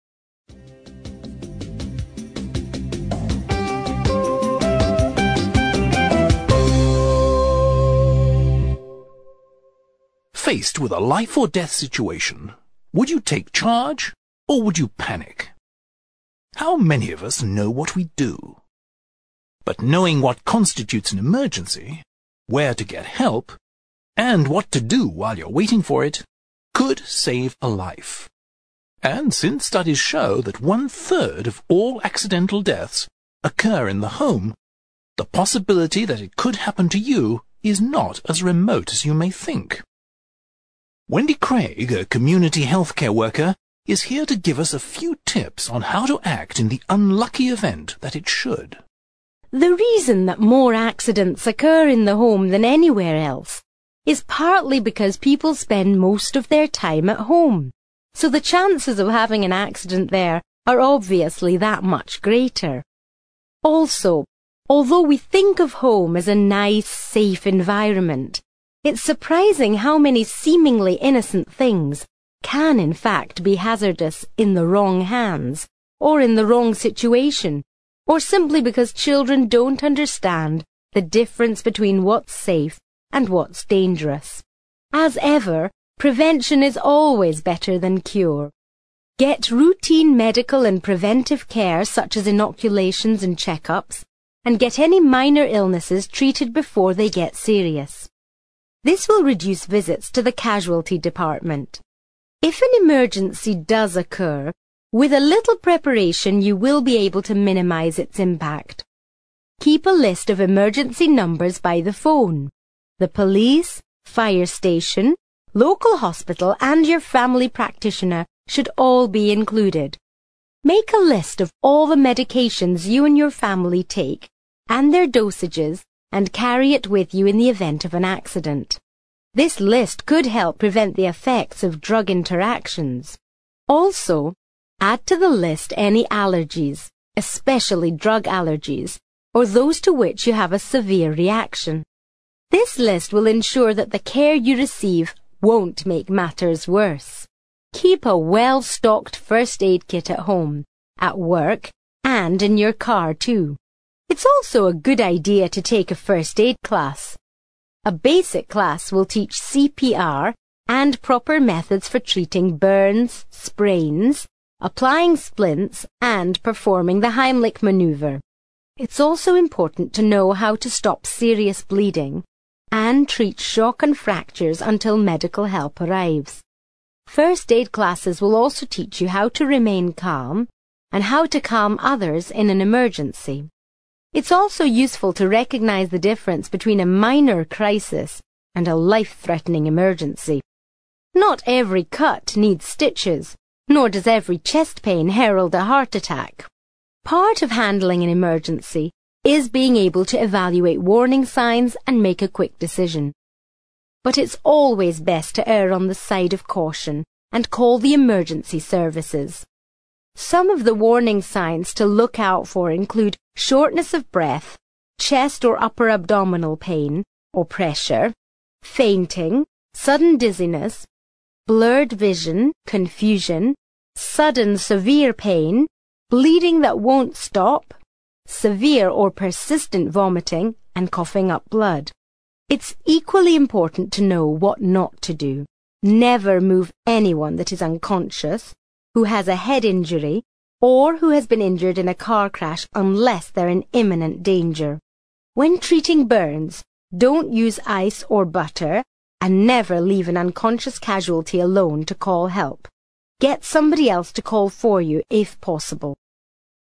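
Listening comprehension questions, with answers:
You will hear an extract from a radio programme in which a healthcare worker gives advice on how to act in an emergency. After listening, for questions 9-17 complete the blank spaces in the sentences below with a word or short phrase. Then check the audio transcription and the correct answers.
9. According to research of all accidental deaths happen at home.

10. People are mistaken in the belief that the home is a .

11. It is difficult for to distinguish between those objects which are safe and those which are not.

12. Wendy advises taking the precaution of having inoculations and .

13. Being prepared for an emergency can its seriousness.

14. Carrying a list of medications can prevent a to medication you are allergic to.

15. First-aid classes not only train you in how to administer basic medical treatment, but also how to yourself in an emergency.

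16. Judging how serious a situation is and coming to a is part of dealing with an emergency.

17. You should only move a victim of a car accident if they are in .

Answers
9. one third
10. nice, safe environment
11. children
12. checkups
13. minimize
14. severe reaction
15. remain calm
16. quick decision
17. imminent danger

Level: CPE Proficiency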